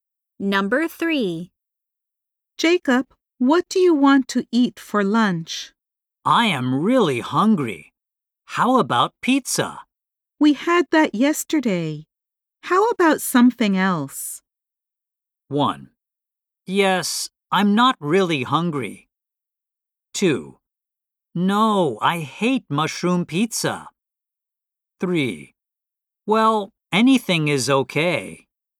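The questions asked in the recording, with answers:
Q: We had that yesterday. How about something else?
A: 3: Well, anything is okay.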